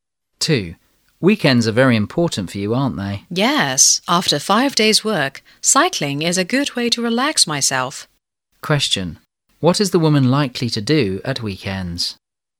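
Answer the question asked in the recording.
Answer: Go cycling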